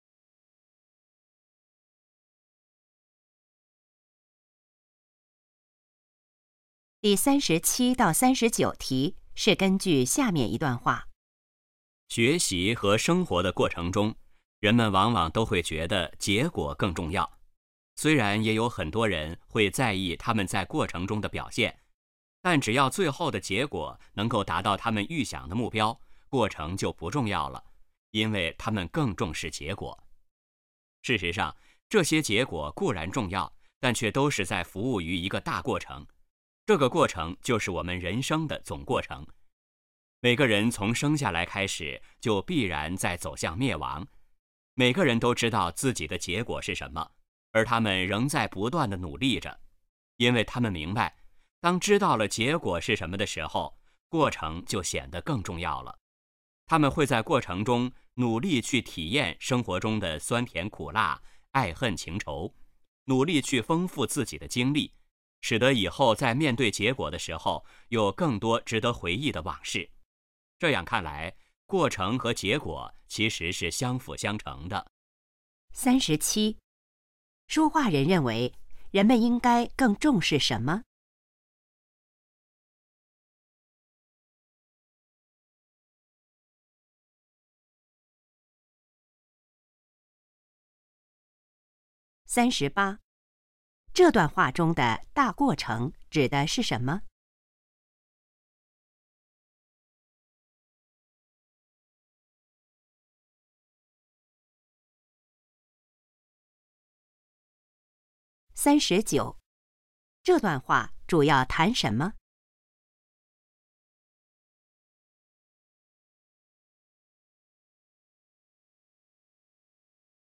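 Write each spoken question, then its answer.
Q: 说话人认为人们应该更重视什么?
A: 过程

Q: 这段话中的大过程指的是什么?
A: 人生的总过程

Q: 这段话主要谈什么?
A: 过程与结果的关系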